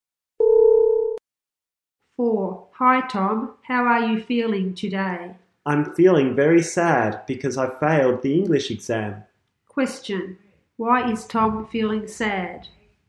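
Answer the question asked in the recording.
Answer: He failed the English exam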